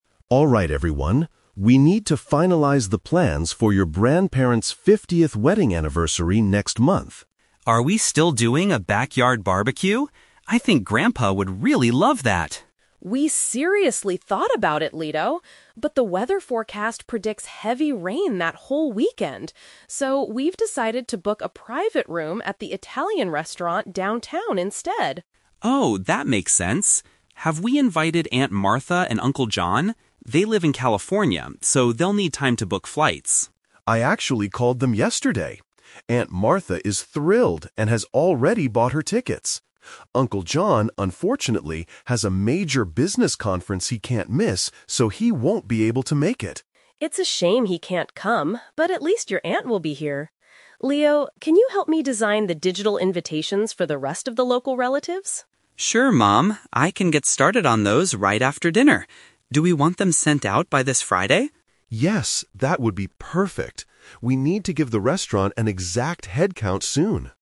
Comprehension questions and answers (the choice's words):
Listen to a family discussing their grandparents' anniversary. Choose the best answer (A, B, or C) for each question.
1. Where is the anniversary celebration going to take place?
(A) In the family's garden.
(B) At an indoor dining venue.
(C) At the grandparents' house.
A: At an indoor dining venue.

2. Why is Uncle John unable to attend the reunion?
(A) He couldn't get a flight from California.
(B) He has to attend a family emergency.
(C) He has work-related commitments.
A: He has work-related commitments.

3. What task is Leo asked to do?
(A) Create online cards for the guests.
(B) Call the relatives who live far away.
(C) Confirm the headcount with the restaurant.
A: Create online cards for the guests.

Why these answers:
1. The mom says they decided to "book a private room at the Italian restaurant downtown." An indoor dining venue is a paraphrase for a restaurant.
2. The dad explains that Uncle John has a "major business conference he can't miss." Paraphrasing: business conference = work-related commitments.
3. The mom asks Leo to "design the digital invitations," which means creating online cards.

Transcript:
Dad: Alright everyone, we need to finalize the plans for your grandparents' 50th wedding anniversary next month.
Leo: Are we still doing a backyard barbecue? I think Grandpa would really love that.
Mom: We seriously thought about it, Leo. But the weather forecast predicts heavy rain that whole weekend. So, we've decided to book a private room at the Italian restaurant downtown instead.
Leo: Oh, that makes sense. Have we invited Aunt Martha and Uncle John? They live in California, so they'll need time to book flights.
Dad: I actually called them yesterday. Aunt Martha is thrilled and has already bought her tickets. Uncle John, unfortunately, has a major business conference he can't miss, so he won't be able to make it.
Mom: It's a shame he can't come, but at least your aunt will be here. Leo, can you help me design the digital invitations for the rest of the local relatives?
Leo: Sure, Mom. I can get started on those right after dinner. Do we want them sent out by this Friday?
Dad: Yes, that would be perfect. We need to give the restaurant an exact headcount soon.